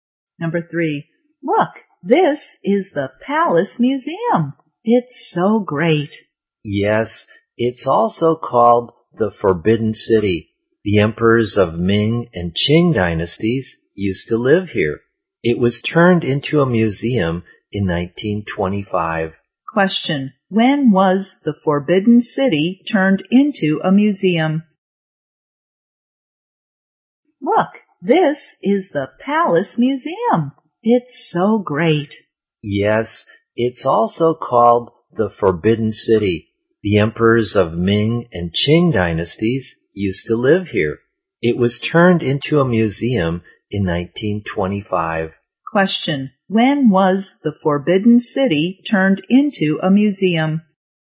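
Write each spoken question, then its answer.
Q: when was the Forbidden City turned into a museum?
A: In 1925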